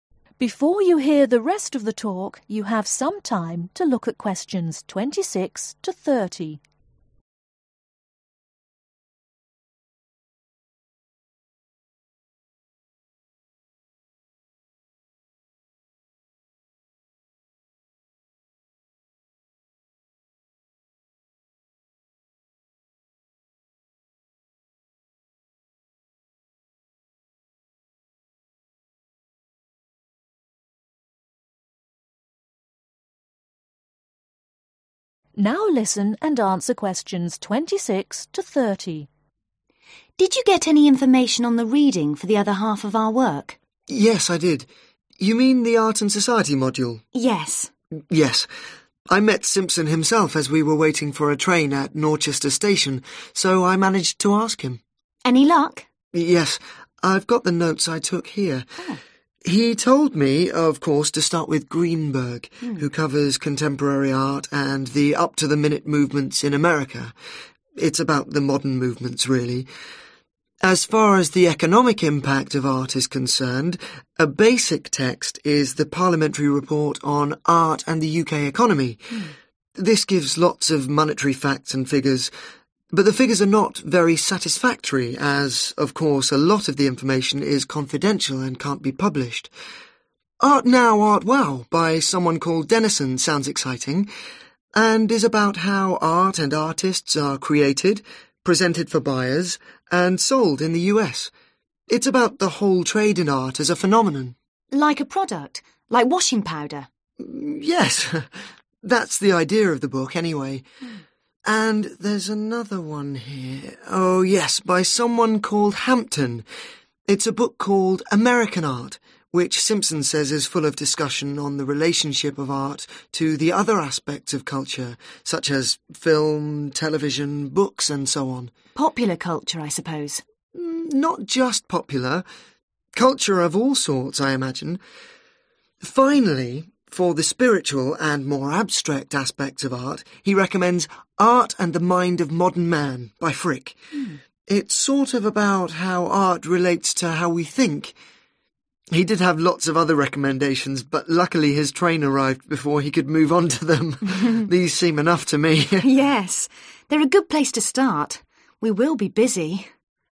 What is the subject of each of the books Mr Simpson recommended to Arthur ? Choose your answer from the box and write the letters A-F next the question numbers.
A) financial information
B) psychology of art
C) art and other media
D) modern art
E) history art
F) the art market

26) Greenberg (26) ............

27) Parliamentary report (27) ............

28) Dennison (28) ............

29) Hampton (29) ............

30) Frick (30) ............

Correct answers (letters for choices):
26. D
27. A
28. F
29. C
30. B